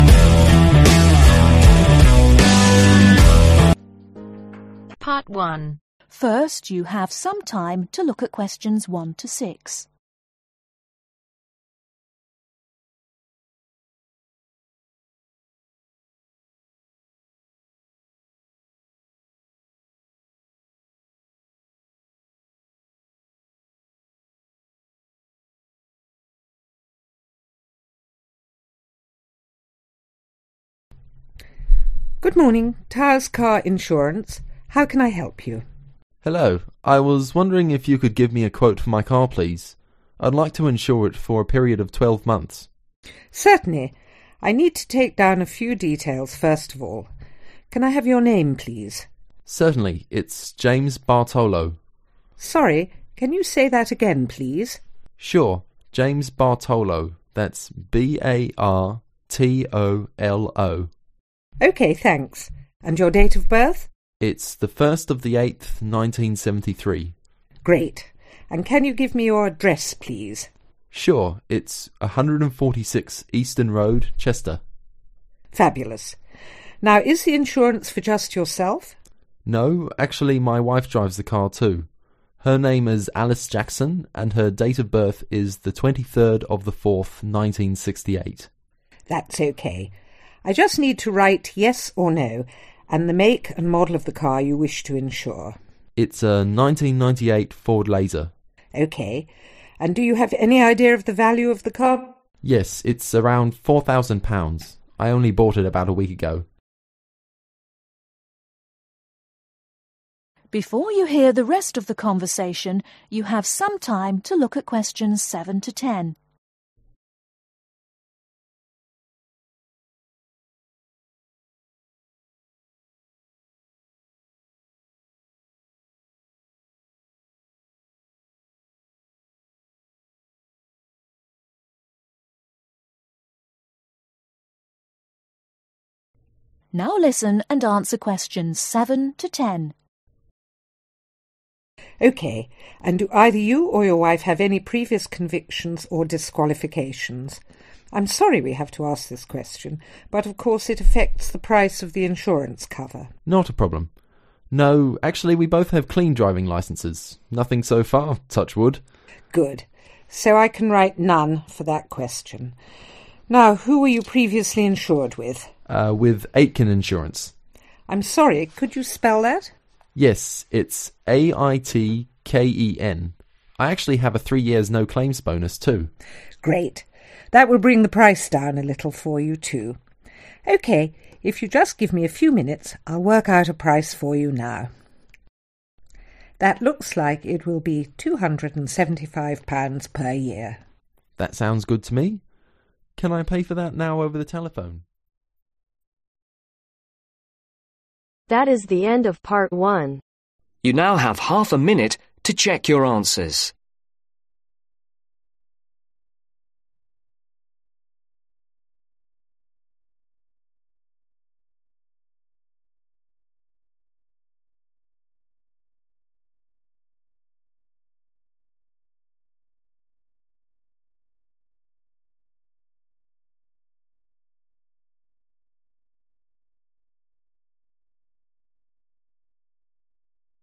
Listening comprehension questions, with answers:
Complete the information below. Write NO MORE THAN TWO WORDS OR A NUMBER for each answer.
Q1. Name: (1)............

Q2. D.O.B: (2)............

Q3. Address: 146 (3)............ , Chester.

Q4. Other drivers ?: (4)............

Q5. Vehicle to be insured (year, make and model): 1998 (5)............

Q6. Value: (6)............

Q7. Previous convictions / disqualifications: (7)............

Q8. No claims bonus (year): (8)............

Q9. Previous insurer (name): (9)............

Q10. Quotation (per year): (10)............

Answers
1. James Bartolo
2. 01/08/73
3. 146 Eastern Road
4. Yes
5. Ford Laser
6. £4000
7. None
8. 3
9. Aitken
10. £275